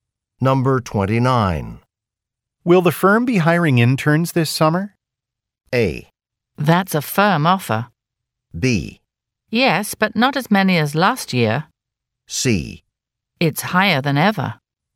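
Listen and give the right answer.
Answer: B: Yes, but not as many as last year.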